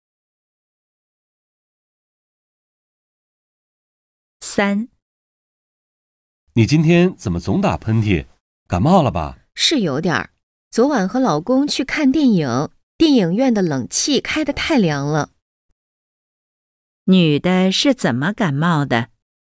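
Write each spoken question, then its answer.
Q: 女的是怎么感冒的?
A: 电影院的冷气开得太凉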